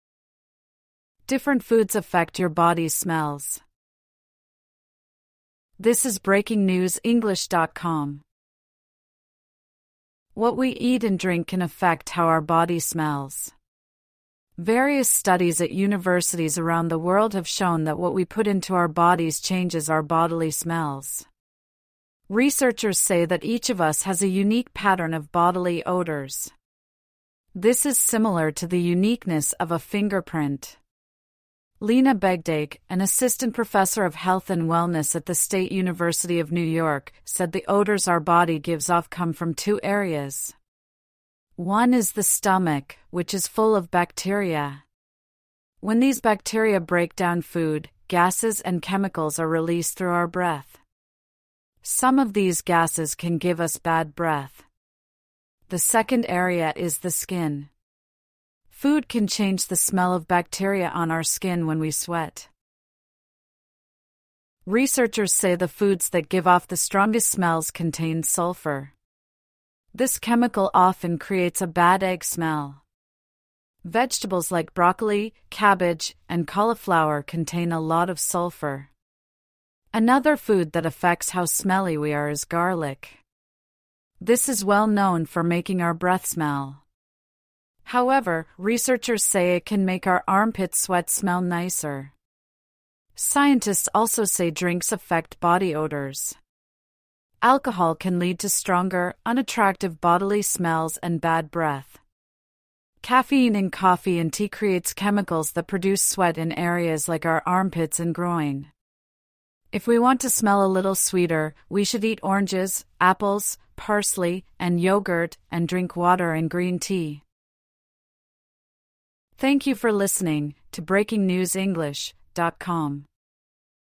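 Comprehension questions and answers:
True / False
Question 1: Food but not drink affects the smells coming from our body.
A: F

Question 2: The article suggests our body smells are as unique as our fingerprints.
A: T

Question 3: Food changes our bodily smells via the stomach and the skin.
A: T

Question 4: The article says sweat can wash away badsmelling bacteria on our skin.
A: F

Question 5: The chemical sulphur gives off a sweetsmelling smell.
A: F

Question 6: Garlic can make our armpits smell nicer.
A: T

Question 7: Chemicals from coffee can affect the sweat in our armpits.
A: T

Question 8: Drinking green tea is good if we want to smell sweeter.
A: T

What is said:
(1/26) Different foods affect your body's smells
What we eat and drink can affect how our body smells. Various studies at universities around the world have shown that what we put into our bodies changes our bodily smells. 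Researchers say that each of us has a unique pattern of bodily odours. This is similar to the uniqueness of a fingerprint. Lina Begdache, an assistant professor of health and wellness at the State University of New York, said the odours our body gives off come from two areas. One is the stomach, which is full of bacteria. When these bacteria break down food, gases and chemicals are released through our breath. Some of these gases can give us bad breath. The second area is the skin. Food can change the smell of bacteria on our skin when we sweat.
Researchers say the foods that give off the strongest smells contain sulphur. This chemical often creates a "bad-egg smell". Vegetables like broccoli, cabbage, and cauliflower contain a lot of sulphur. Another food that affects how smelly we are is garlic. This is well known for making our breath smell. However, researchers say it can make our armpit sweat smell nicer. 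Scientists also say drinks affect body odours. Alcohol can lead to stronger, unattractive bodily smells and bad breath. Caffeine in coffee and tea creates chemicals that produce sweat in areas like our armpits and groin. If we want to smell a little sweeter, we should eat oranges, apples, parsley, and yoghurt, and drink water and green tea.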